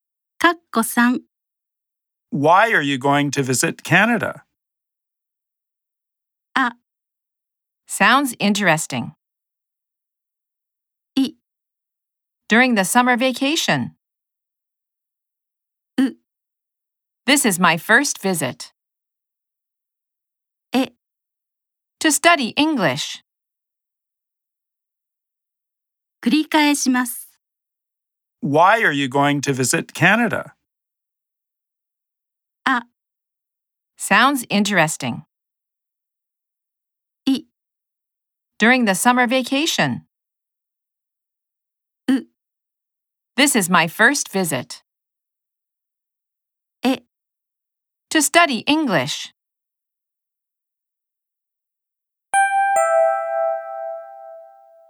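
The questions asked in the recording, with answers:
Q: Why are you going to visit Canada?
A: え: To study English.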